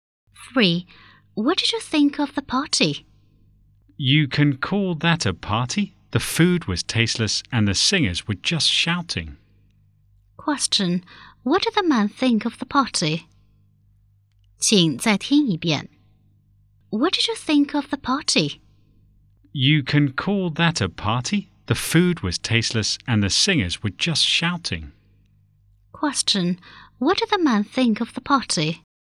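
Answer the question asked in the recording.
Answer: It was terrible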